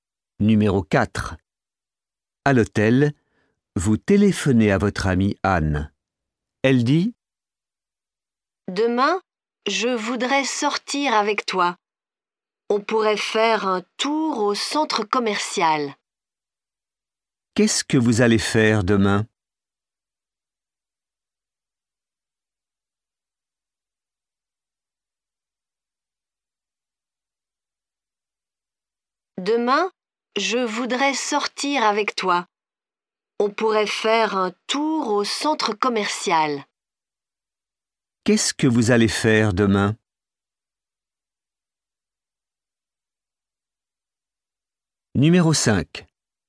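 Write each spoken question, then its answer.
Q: Qu'est-ce que vous allez faire demain?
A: Faire un tour au centre commercial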